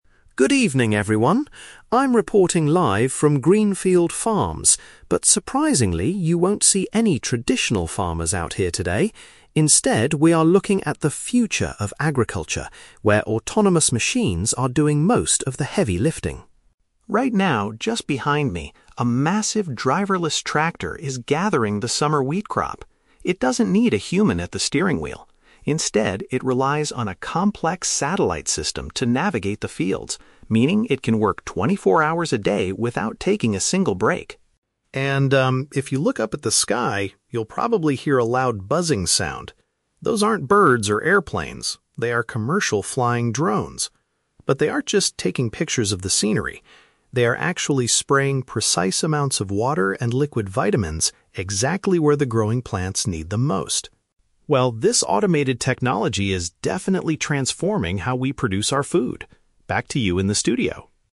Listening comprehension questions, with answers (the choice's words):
Listen to a TV reporter giving a news update from a farm and choose the correct answer (A, B, or C) for each question.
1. How does the large harvesting machine find its way around the farm?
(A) By following physical tracks laid on the ground.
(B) By using a network of objects in space.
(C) By having a person steer it from a distance.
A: By using a network of objects in space.

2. What is one major advantage of the new tractor mentioned in the report?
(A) It is much cheaper to operate than paying farm workers.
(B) It can finish the entire harvest in just a few short hours.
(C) It has the ability to operate continuously all day and night.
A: It has the ability to operate continuously all day and night.

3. What is the main task of the flying devices in the sky?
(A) They are capturing photographs of the beautiful landscape.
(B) They are providing liquid hydration and nutrients to the crops.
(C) They are making loud noises to scare the birds away from the wheat.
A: They are providing liquid hydration and nutrients to the crops.

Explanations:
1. The reporter states that the tractor relies on a "complex satellite system." Satellites are a network of objects in space.
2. The reporter explains that the machine can "work 24 hours a day without taking a single break," which is a paraphrase of operating continuously all day and night.
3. The drones are "spraying precise amounts of water and liquid vitamins" where the plants need them. "Providing liquid hydration and nutrients" is a strong paraphrase of this action.

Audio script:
TV Reporter: Good evening, everyone. I'm reporting live from Greenfield Farms, but surprisingly, you won't see any traditional farmers out here today. Instead, we are looking at the future of agriculture, where autonomous machines are doing most of the heavy lifting.
Right now, just behind me, a massive driverless tractor is gathering the summer wheat crop. It doesn't need a human at the steering wheel. Instead, it relies on a complex satellite system to navigate the fields, meaning it can work 24 hours a day without taking a single break.
And, um, if you look up at the sky, you'll probably hear a loud buzzing sound. Those aren't birds or airplanes; they are commercial flying drones. But they aren't just taking pictures of the scenery. They are actually spraying precise amounts of water and liquid vitamins exactly where the growing plants need them most.
Well, this automated technology is definitely transforming how we produce our food. Back to you in the studio!